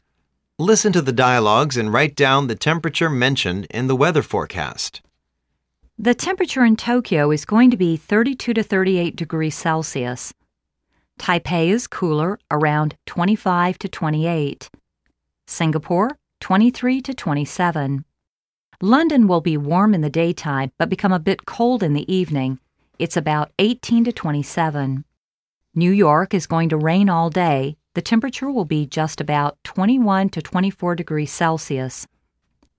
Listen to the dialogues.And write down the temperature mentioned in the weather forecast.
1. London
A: 18-27 degrees Celsius

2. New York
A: 21-24 degrees Celsius

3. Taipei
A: 25-28 degrees Celsius

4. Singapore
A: 23-27 degrees Celsius

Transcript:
-The temperature in Tokyo is going to be 32-38 degrees Celsius.
-Taipei is cooler around 25-28.
-Singapore 23-27.
-London will be warm in the day time but become a bit cold in the evening, it's about 18-27.
-New York is going to rain all day;the temperature will be just about 21-24 degrees Celsius.